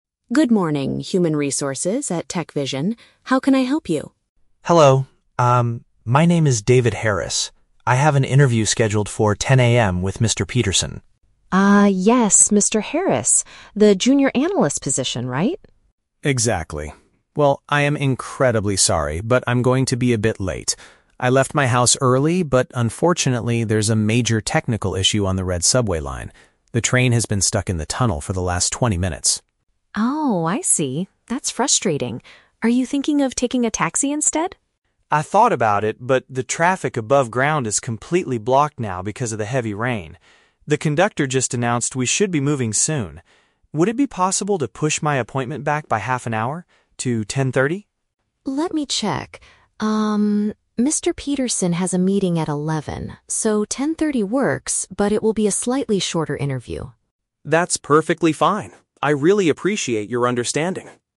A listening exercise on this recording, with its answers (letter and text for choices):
Listen to a phone conversation between a job applicant and an HR assistant. Choose the correct answer (A, B, or C) for each question.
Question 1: Why is the man going to be late for his interview?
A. He could not find an available taxi in the rain.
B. There is a mechanical problem with his train.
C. He left his house much later than he planned.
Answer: B. There is a mechanical problem with his train.

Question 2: Why did the man decide NOT to take a taxi?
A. The roads are heavily congested.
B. He did not have enough cash with him.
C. The train conductor told him it was dangerous.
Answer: A. The roads are heavily congested.

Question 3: What is the final agreement about the interview?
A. It will be moved to 11:00 AM.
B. It will be postponed to another day.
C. It will happen later but will last for less time.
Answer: C. It will happen later but will last for less time.

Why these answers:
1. The man says there is a "major technical issue on the red subway line" and the train is stuck. This is paraphrased as "a mechanical problem with his train".
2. The man says "the traffic above ground is completely blocked". "Heavily congested" is a synonym for completely blocked traffic.
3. The assistant agrees to push the appointment back to 10:30, but warns that "it will be a slightly shorter interview" (last for less time).

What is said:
HR Assistant: Good morning, Human Resources at TechVision. How can I help you?
Candidate: Hello. Um, my name is David Harris. I have an interview scheduled for 10:00 AM with Mr. Peterson.
HR Assistant: Ah, yes, Mr. Harris. The junior analyst position, right?
Candidate: Exactly. Well, I am incredibly sorry, but I'm going to be a bit late. I left my house early, but unfortunately, there's a major technical issue on the red subway line. The train has been stuck in the tunnel for the last twenty minutes.
HR Assistant: Oh, I see. That's frustrating. Are you thinking of taking a taxi instead?
Candidate: I thought about it, but the traffic above ground is completely blocked now because of the heavy rain. The conductor just announced we should be moving soon. Would it be possible to push my appointment back by half an hour? To 10:30?
HR Assistant: Let me check... Peterson has a meeting at 11:00, so 10:30 works, but it will be a slightly shorter interview.